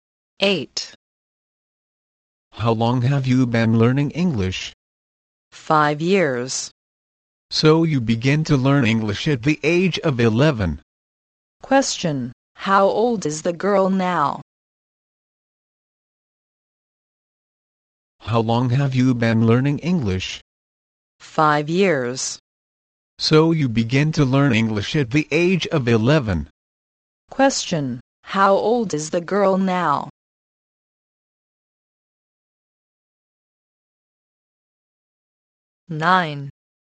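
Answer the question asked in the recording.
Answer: 16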